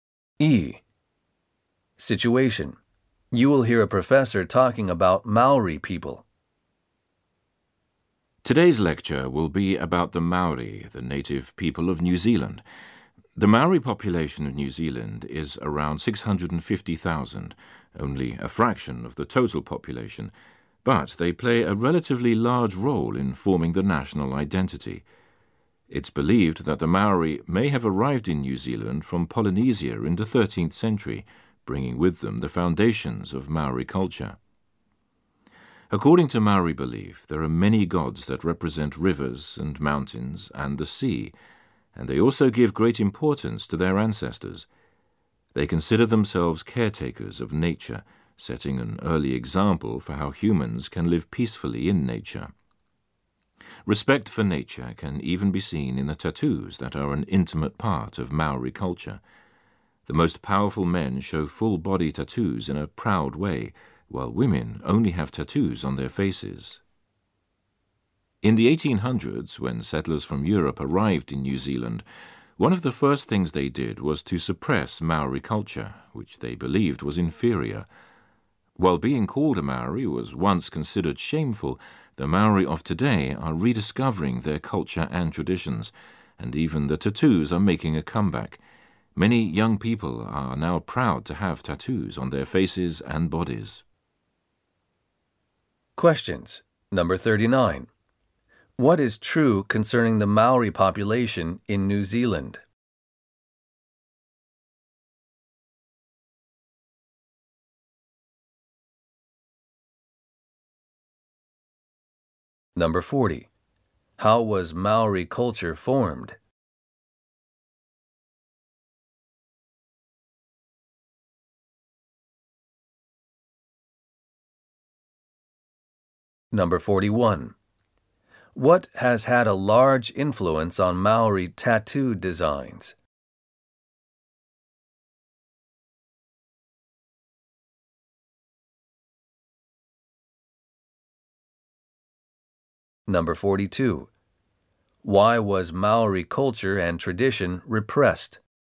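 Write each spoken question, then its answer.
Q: What is true concerning the Maori population in New Zealand?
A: They are a small fraction of the population but play a large role in the national identity

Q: How was Maori culture formed?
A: Its foundations were brought from Polynesia

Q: What has had a large influence on Maori tattoo designs?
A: Respect for nature

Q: Why was Maori culture and tradition repressed?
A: European settlers believed it was inferior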